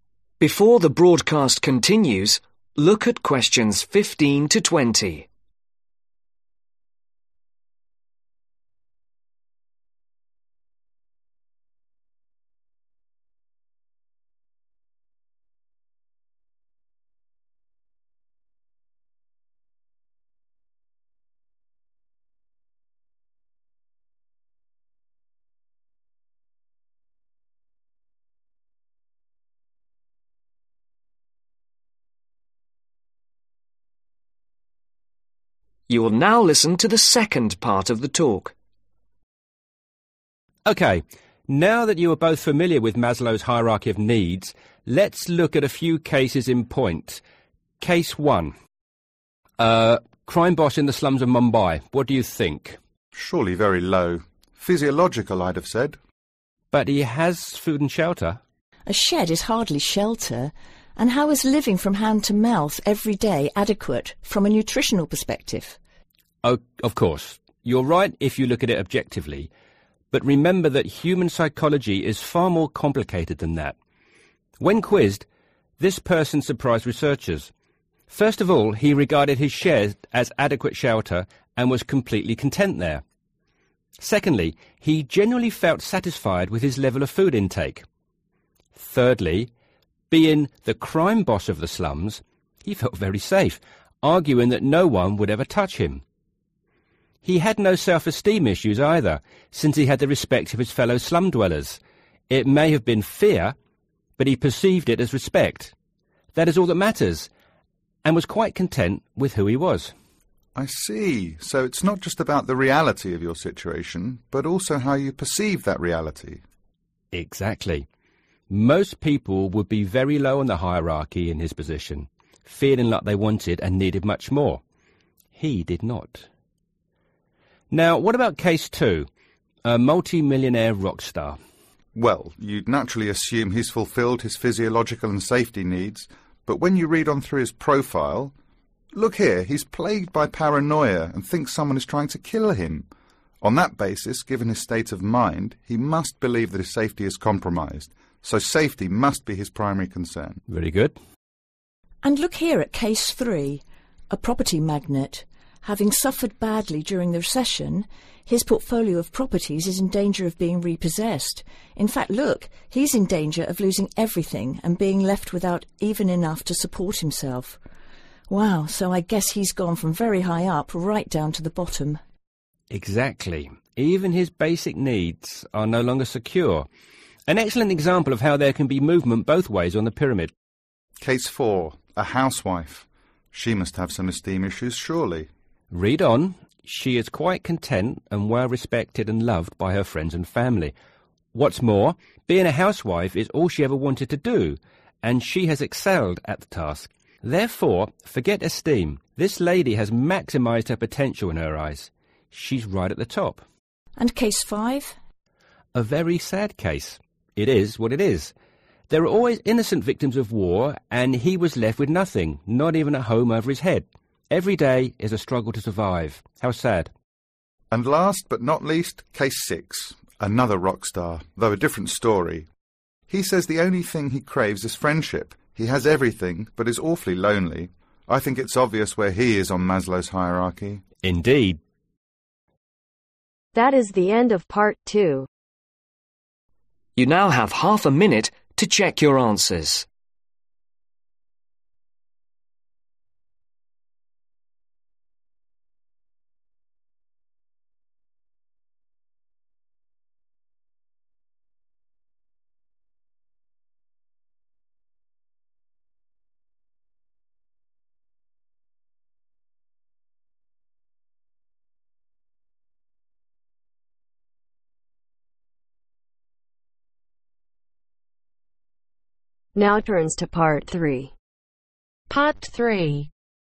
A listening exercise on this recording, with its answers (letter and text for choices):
Write the correct letter, A , B , C , D or E next to questions 15-20.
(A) Physiological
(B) Safety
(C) Love and Belonging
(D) Esteem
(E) Self – actualisation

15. Case 1 ............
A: (E) Self – actualisation

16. Case 2 ............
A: (B) Safety

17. Case 3 ............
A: (A) Physiological

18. Case 4 ............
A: (E) Self – actualisation

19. Case 5 ............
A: (A) Physiological

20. Case 6 ............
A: (C) Love and Belonging